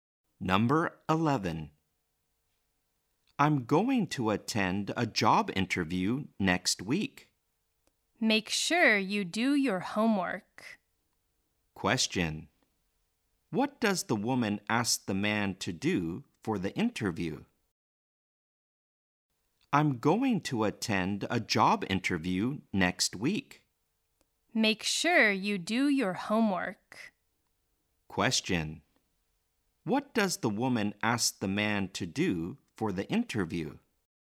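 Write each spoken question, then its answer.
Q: What does the woman ask the man to do for the interview?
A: Prepare well for it (do his homework).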